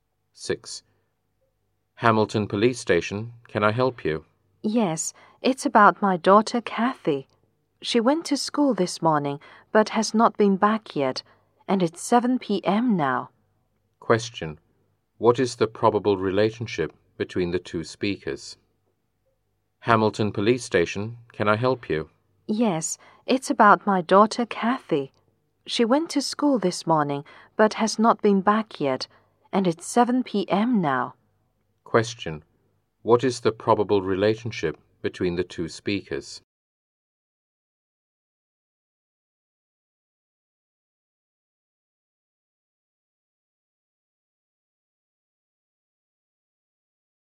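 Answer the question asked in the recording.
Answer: Police officer and a parent (mother/father) reporting a missing child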